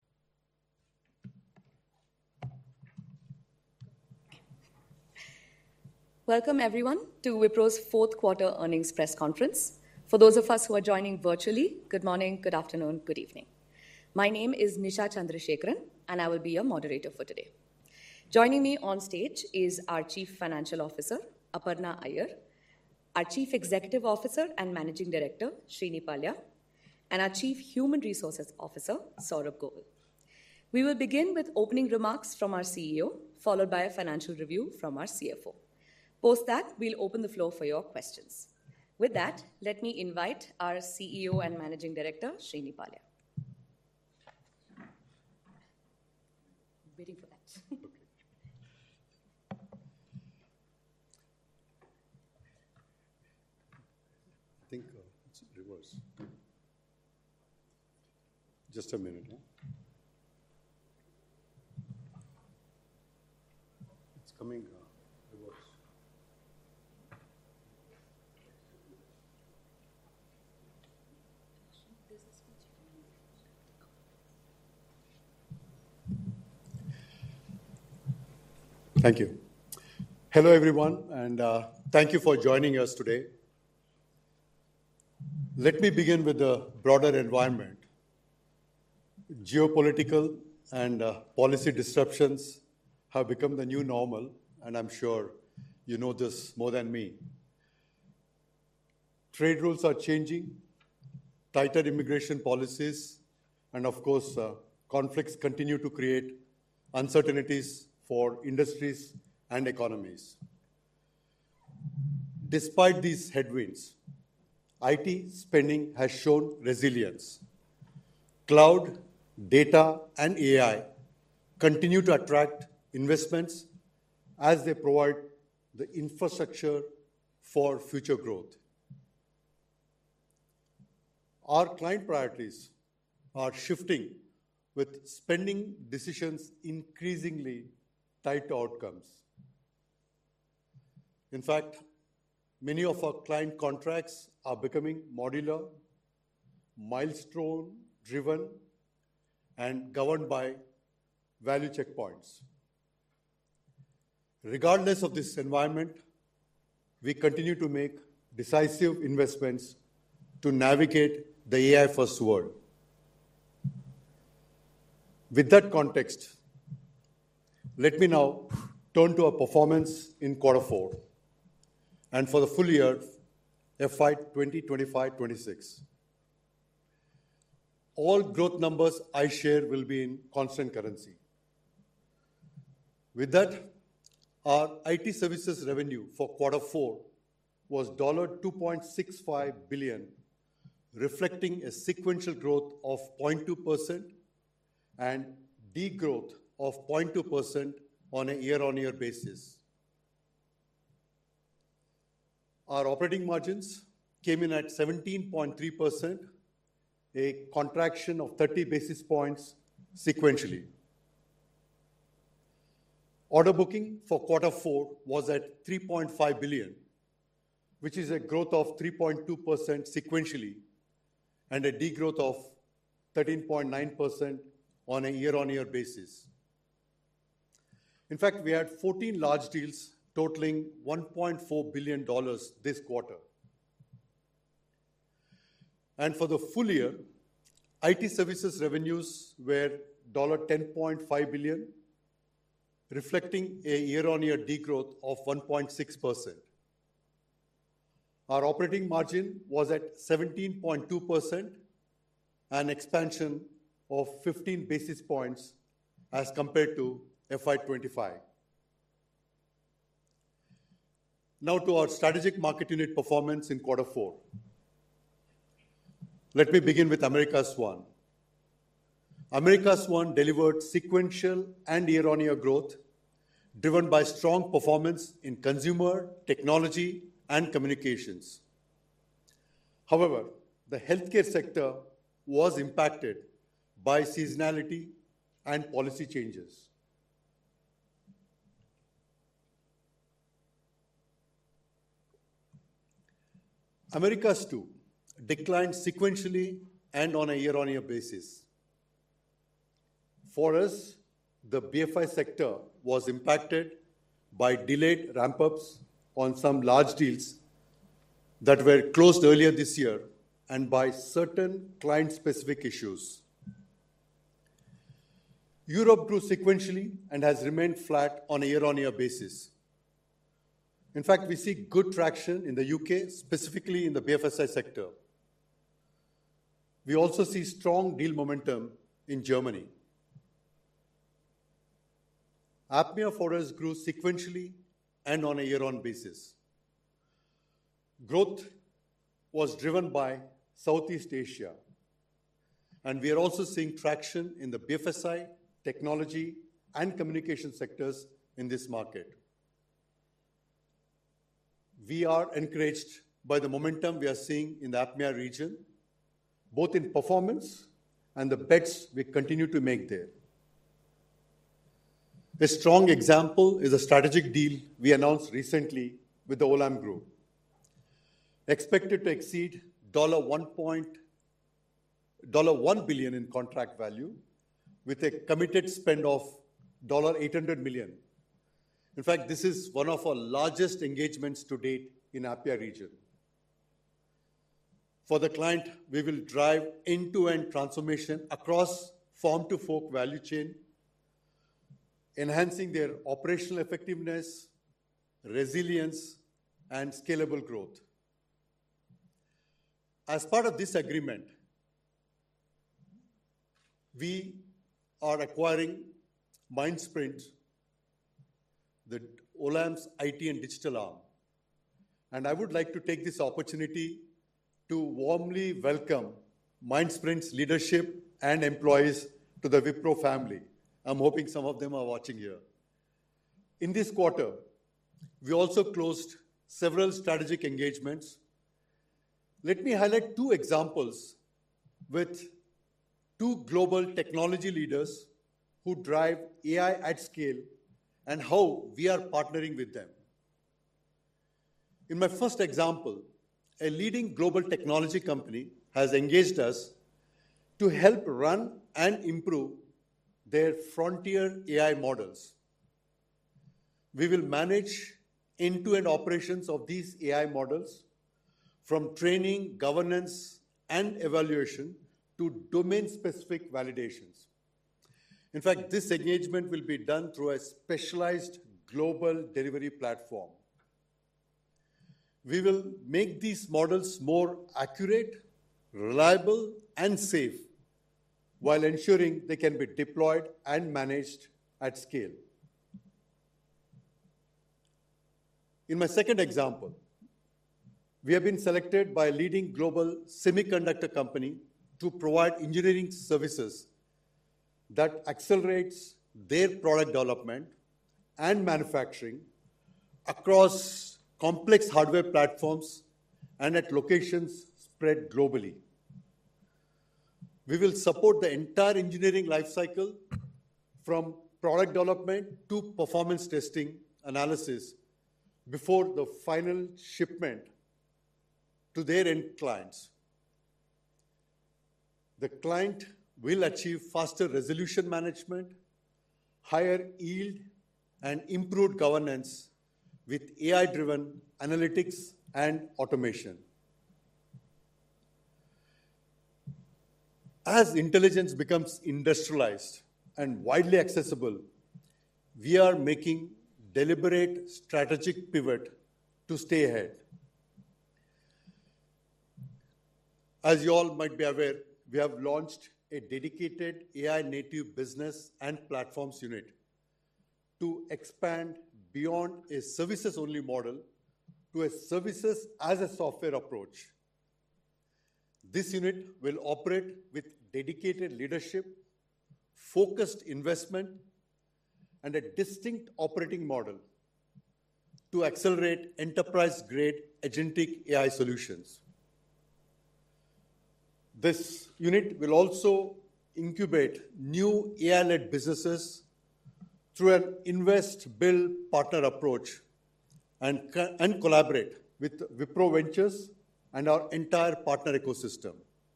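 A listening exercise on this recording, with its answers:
用 1-2 句话用自己的话回答下面的问题。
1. What was Wipro's IT services revenue for Q4 in constant currency, and what were the sequential and year-on-year growth rates?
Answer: $2.65 billion; sequential growth of 0.2% and year-on-year degrowth of 0.2%

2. How many large deals did Wipro close in Q4, and what was their total value? Also, name one specific client deal mentioned and its expected contract value.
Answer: 14 large deals totaling $1.4 billion; the Olam Group deal, expected to exceed $1 billion in contract value

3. According to the CEO, which two examples of strategic engagements were highlighted, and what specific services will Wipro provide for each client?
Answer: A global technology company: run and improve its frontier AI models end to end (training, governance, evaluation, validation); a global semiconductor company: engineering services across the whole engineering life cycle, from product development to performance testing

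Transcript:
Welcome everyone to Wipro's fourth quarter earnings press conference. For those of us who are joining virtually, good morning, good afternoon, good evening.
My name is Nisha Chandrasekran and I will be your moderator for today. Joining me on stage is our Chief Financial Officer, Aparna Ayer,
Joining me on stage is our Chief Financial Officer, Aparna Iyer, our Chief Executive Officer and Managing Director, Thierry Delaporte, Director, Thierry Delaporte, and our Chief Human Resources Officer, Saurabh Govil. Saurabh Govil. We will begin with opening remarks from our CEO, followed by a financial review from our CFO. from our CFO.
Post that, we'll open the floor for your questions. questions. With that, let me invite our CEO and Managing Director, Thierry Delaporte. I think I think it's reverse. It's coming reverse. Thank you. Thank you. Hello everyone and thank you for joining us today. 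Let me begin with a broader environment. Geopolitical and policy disruptions have become the new normal and I'm sure you know this more than me. Trade rules are changing, tighter immigration policies, tighter immigration policies, and of course, conflicts continue to create uncertainties for industries and
economies. Despite these headwinds, Despite these headwinds, IT spending has shown resilience. Cloud, data, and AI continue to attract investments as they provide the infrastructure for future growth. Our client priorities are shifting are shifting with spending decisions increasingly tied to outcomes. In fact, In fact, many of our client contracts are becoming modular, becoming modular, milestone driven, milestone driven, and governed by value checkpoints. value checkpoints. Regardless of this environment, we continue to make decisive investments to navigate the AI-first world. With that context, With that context, let me
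now turn to our performance in quarter four quarter four and for the full year FY 2025-26. All growth numbers I share will be in constant currency. constant currency. With that, With that, our IT services revenue for quarter four was $2.65 billion, billion, reflecting a sequential growth of 0.2% and de-growth of 0.2% on a year-on-year basis.
Revenue declined 0.2% on a year-on-year basis in constant currency terms. For FY26, our IT services revenues declined by 1.6% in constant currency. Our
operating margins for the quarter was at 17.3%.
sequentially and 8.8% on a year-on-year basis. a year-on-year basis. BFSI declined 1.3% sequentially and and 0.5% year-on-year. Health declined 4.4% sequentially and was flat year-on-year. Consumer grew 1.7% sequentially and declined 2.9% year-on-year. declined 2.9% year-on-year. Technology and communication sector grew 5.3% sequentially and grew 10.4% year-on-year. 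year-on-year. EMR grew 1.1% sequentially while declining declining 6% year-on-year.
On a year on year basis, our operating margins came in at 17.3%, a contraction of 30 basis points sequentially.
Order booking for Q4 was at 3.5 billion, which is a growth of 3.2% sequentially and a degrowth of 13.9% on a year on year basis.
In fact, we had 14 large deals totaling $1.4 billion this quarter.
And for the full year, it services revenues were dollar ten point five billion reflecting a year on year degrowth of 1.6%.
Our operating margin was at 17.2% and expansion of 15 basis points as compared to FI 25.
Now to our strategic market unit performance in Q4.
America's 1 delivered sequential and year on year growth driven by strong performance in consumer technology and communications.
However, the healthcare sector was impacted by seasonality and policy changes.
Americas too declined sequentially and on a year on year basis for us.
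The BFI sector was impacted by delayed ramp UPS on some large deals that were closed earlier this year, and by certain client specific issues.
Europe grew sequentially and has remained flat on a year on year basis.
In fact, we see good traction in the UK, specifically in the BFSI sector.
We also see strong deal momentum in Germany.
APMIA for us grew sequentially and on a year on basis growth was driven by Southeast Asia, and we are also seeing traction in the BFSI technology and communication sectors in this market.
We are encouraged by the momentum we are seeing in the Atma region, both in performance and the bets we continue to make there.
A strong example is a strategic deal we announced recently with the Olam Group expected to exceed dollar one point dollar 1 billion in contract value with a committed spend of dollar eight hundred million.
In fact, this is one of our largest engagements to date in Apia region.
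For the client, we will drive end to end transformation across form to fork value chain, enhancing their operational effectiveness, resilience and scalable growth.
As part of this agreement, we are acquiring Mind Sprint, the Olam's it and digital arm.
And I would like to take this opportunity to warmly welcome Mind Sprint's leadership and employees to the Wipro family.
I'm hoping some of them are watching here.
In this quarter, we also closed several strategic engagements.
Let me highlight two examples with two global technology leaders who drive AI at scale and how we are partnering with them.
In my first example, a leading global technology company has engaged us to help run and improve their frontier AI models.
We will manage end to end operations of these AI models from training, governance and evaluation to domain specific validations.
In fact, this engagement will be done through a specialized global delivery platform.
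We will make these models more accurate, reliable and safe while ensuring they can be deployed and managed at scale.
In my second example, we have been selected by leading global semiconductor company to provide engineering services that accelerates their product development and manufacturing across complex hardware platforms and at locations spread globally.
We will support the entire engineering life cycle, from product development to performance testing analysis before the final shipment to their end clients.
The client will achieve faster resolution management, higher yield and improved governance with AI driven analytics and automation.
As intelligence becomes industrialized and widely accessible, we are making deliberate strategic pivot to stay ahead.
As you all might be aware, we have launched a dedicated AI Native Business and platforms unit to expand beyond a services only model to a services as a software approach.
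This unit will operate with dedicated leadership, focused investment and a distinct operating model to accelerate enterprise grade agentic AI solutions.
This unit will also incubate new AI LED businesses through an invest, build partner approach and, and collaborate with Wipro Ventures and our entire partner ecosystem together with core services.
This, this creates a dual engine model, driving transformation at scale while building AI native platforms that differentiate services that enables repeatable deployments and of course, unlock nonlinear growth for, for us for the future.

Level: CEFRC1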